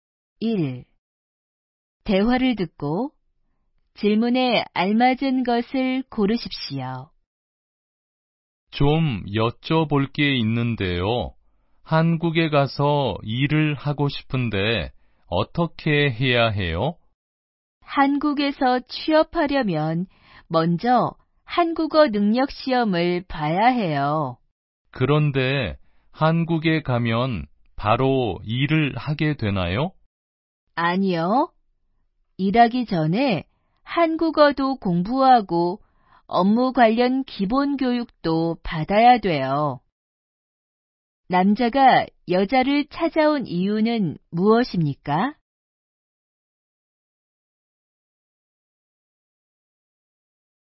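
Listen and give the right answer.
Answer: 한국에서 일하는 방법을 물어보려고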